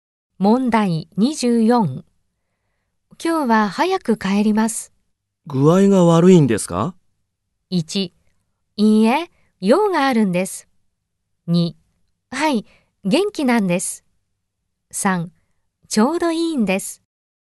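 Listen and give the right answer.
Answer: 1: いいえ、用があるんです。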